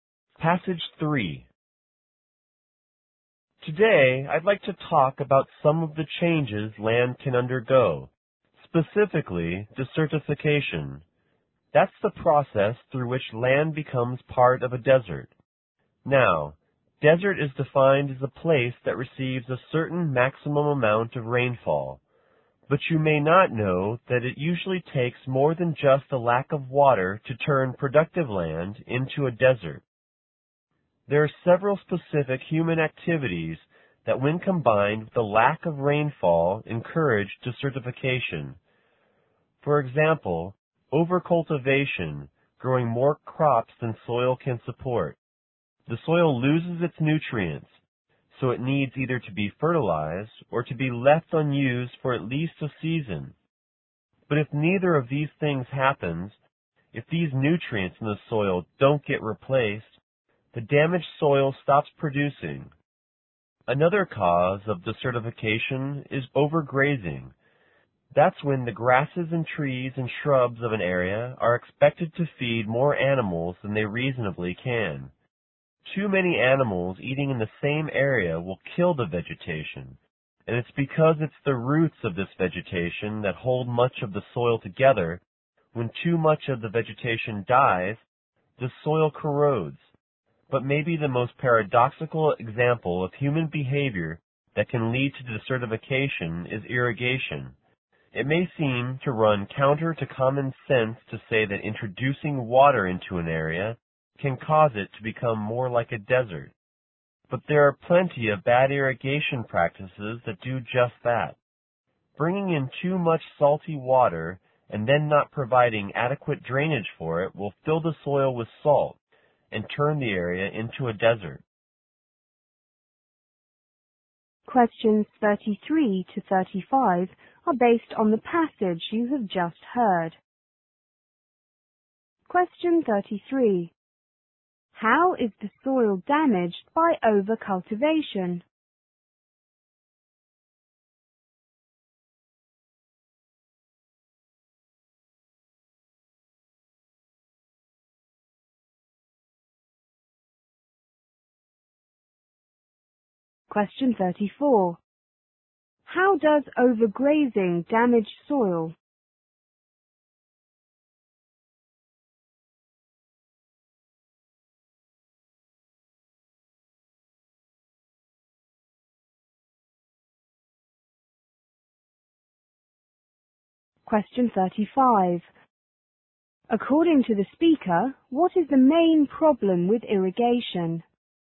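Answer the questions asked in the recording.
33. It loses its nutrients
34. Animals kill the vegetation whose roots hold the soil together
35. Too much salty water without adequate drainage fills the soil with salt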